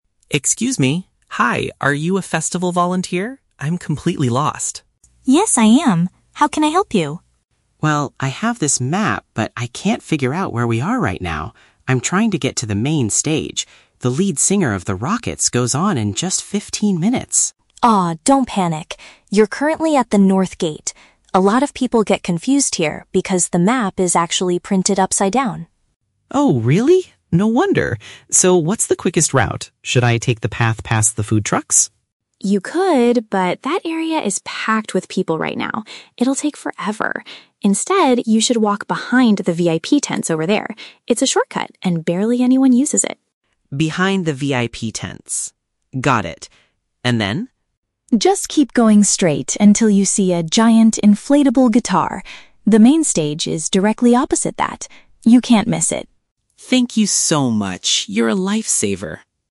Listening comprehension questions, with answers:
Listen to a conversation between a festival attendee and a volunteer, and choose the correct answer (A, B, or C) for each question.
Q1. What is the main reason the man is currently lost?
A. He entered the festival through the wrong entrance gate.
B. The layout guide he is holding is oriented incorrectly.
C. He dropped his mobile phone and cannot use his GPS.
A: The layout guide he is holding is oriented incorrectly.

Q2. Which way does the volunteer advise the man to walk?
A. Down the main walkway where all the food stalls are located.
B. Along a quieter route located near the exclusive guest area.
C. Through an emergency exit path reserved for staff members.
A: Along a quieter route located near the exclusive guest area.

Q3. How will the man recognize that he is close to his destination?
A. He will hear the famous band starting their performance.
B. He will see a brightly lit digital sign with the stage's name.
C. He will spot a massive object shaped like a musical instrument.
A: He will spot a massive object shaped like a musical instrument.

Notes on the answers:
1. Sophie tells Mark that "the map is actually printed upside down." Option (B) uses paraphrasing ("layout guide" = map, "oriented incorrectly" = printed upside down). Option (A) is a trap; Sophie mentions he is at the "North Gate," but she never says it is the wrong entrance. Option (C) is a plausible reason for getting lost, but it is not mentioned in the audio.
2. Sophie tells him to walk "behind the VIP tents" because it is a shortcut and "barely anyone uses it." Option (B) perfectly paraphrases this ("quieter route" = barely anyone uses it, "exclusive guest area" = VIP tents). Option (A) is a trap; the man asks about the path past the "food trucks" (food stalls), but Sophie rejects it because it is "packed with people." Option (C) is never mentioned.
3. Sophie says he will know he is there when he sees a "giant inflatable guitar." Option (C) uses synonyms ("massive object" = giant inflatable, "musical instrument" = guitar). Option (A) is a trap; the band (The Rockets) is mentioned at the beginning, but hearing them is not the visual landmark Sophie gives him. Option (B) is a logical guess but is not mentioned.

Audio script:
Mark: Excuse me! Hi, are you a festival volunteer? I'm completely lost.
Sophie: Yes, I am! How can I help you?
Mark: Well, I have this map, but I can't figure out where we are right now. I'm trying to get to the Main Stage. The lead singer of The Rockets goes on in just 15 minutes!
Sophie: Ah, don't panic! You're currently at the North Gate. A lot of people get confused here because the map is actually printed upside down.
Mark: Oh, really? No wonder! So, what's the quickest route? Should I take the path past the food trucks?
Sophie: You could, but that area is packed with people right now. It'll take forever. Instead, you should walk behind the VIP tents over there. It's a shortcut and barely anyone uses it.
Mark: Behind the VIP tents... got it. And then?
Sophie: Just keep going straight until you see a giant inflatable guitar. The Main Stage is directly opposite that. You can't miss it!

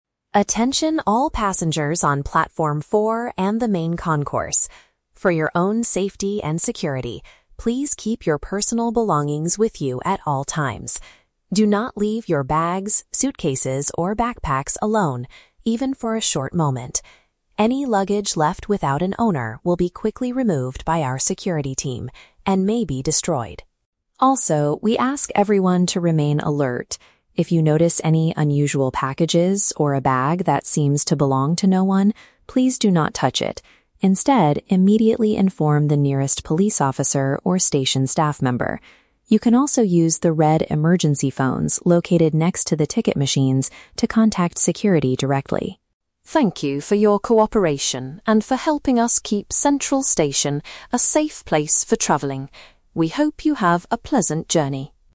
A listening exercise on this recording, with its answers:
Listen to a security announcement at a train station and choose the correct answer (A, B, or C) for each question.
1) What is the most important rule about luggage in this announcement?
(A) Passengers must pay an extra fee for heavy suitcases.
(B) People should leave their backpacks near the ticket machines.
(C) Travelers must stay with their bags at all times.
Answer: Travelers must stay with their bags at all times.

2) What will happen to bags that are left without an owner?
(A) They might be taken away and destroyed.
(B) They will be kept safely in the main concourse.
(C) They will be opened to search for personal identification.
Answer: They might be taken away and destroyed.

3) What should a passenger do if they see an unusual package?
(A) Move it far away from the other travelers.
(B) Tell a station worker or a police officer right away.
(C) Try to open it to see what is inside the box.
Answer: Tell a station worker or a police officer right away.

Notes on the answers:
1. The Key: The announcer says, "keep your personal belongings with you at all times. Do not leave your bags... alone". This means travelers must stay with their bags. The Trap (B): The "ticket machines" are mentioned later, but you should not leave bags there. The machines are where you can find emergency phones. Plausible but not mentioned (A): Paying fees for heavy luggage is common at airports or train stations, but the announcer does not talk about money or fees.
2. The Key: The audio states that luggage left alone "will be quickly removed by our security team and may be destroyed." Taken away means removed. The Trap (B): The "main concourse" is mentioned at the very beginning ("Attention all passengers on platform four and the main concourse"), but bags are not kept safe there; they are destroyed. Plausible but not mentioned (C): Searching a bag for an ID is a logical thing to do when looking for an owner, but the station's rule is to remove and destroy it for safety.
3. The Key: The announcer says, "immediately inform the nearest police officer or station staff member." To inform means to tell someone right away. The Trap (C): The announcer specifically warns passengers "please do not touch it." Therefore, opening it is the exact opposite of what you should do. Plausible but not mentioned (A): Moving it away sounds like a good idea to protect people, but again, the rule is not to touch it.

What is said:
Station Announcer: Attention all passengers on platform four and the main concourse. For your own safety and security, please keep your personal belongings with you at all times. Do not leave your bags, suitcases, or backpacks alone, even for a short moment. Any luggage left without an owner will be quickly removed by our security team and may be destroyed.
Also, we ask everyone to remain alert. If you notice any unusual packages or a bag that seems to belong to no one, please do not touch it. Instead, immediately inform the nearest police officer or station staff member. You can also use the red emergency phones located next to the ticket machines to contact security directly.
Thank you for your cooperation and for helping us keep Central Station a safe place for traveling. We hope you have a pleasant journey.

